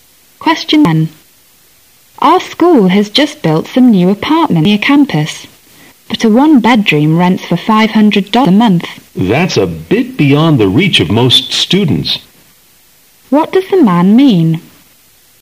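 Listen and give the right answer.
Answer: Most students can't afford the rent.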